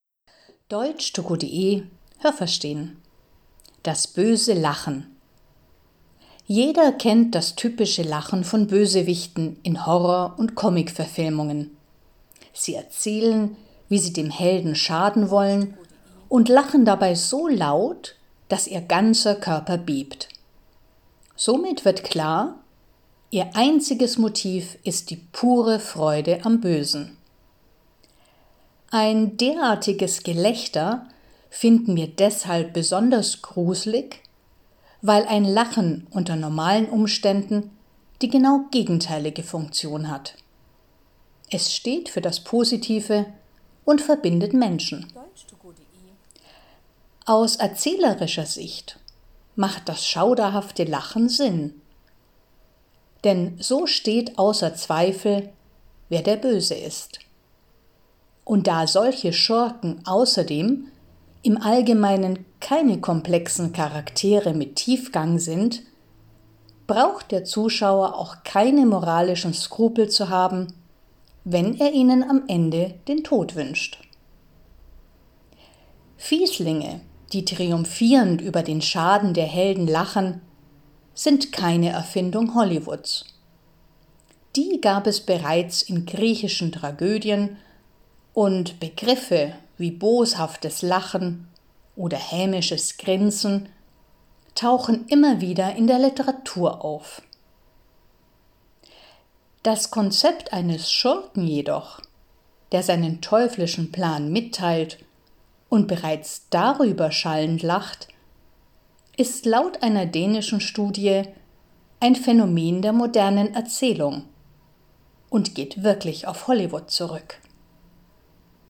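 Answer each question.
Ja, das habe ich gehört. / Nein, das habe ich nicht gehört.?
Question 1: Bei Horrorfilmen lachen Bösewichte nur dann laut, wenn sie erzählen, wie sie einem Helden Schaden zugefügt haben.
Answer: Nein, das habe ich nicht gehört.

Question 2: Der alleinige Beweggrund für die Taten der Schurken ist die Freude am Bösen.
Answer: Ja, das habe ich gehört.

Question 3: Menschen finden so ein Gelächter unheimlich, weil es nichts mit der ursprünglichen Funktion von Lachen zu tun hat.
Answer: Ja, das habe ich gehört.

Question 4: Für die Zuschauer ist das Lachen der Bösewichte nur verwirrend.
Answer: Nein, das habe ich nicht gehört.

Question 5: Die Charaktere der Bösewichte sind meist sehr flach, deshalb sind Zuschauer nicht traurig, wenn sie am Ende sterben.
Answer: Ja, das habe ich gehört.

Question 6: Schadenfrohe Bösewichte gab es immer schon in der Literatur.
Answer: Ja, das habe ich gehört.

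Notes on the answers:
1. Sie lachen bereits, wenn sie von ihren Plänen erzählen, also schon vor der Tat.
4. Durch das böse Lachen der Schurken wird den Zuschauern ganz klar, wer gut und wer böse ist.

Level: C2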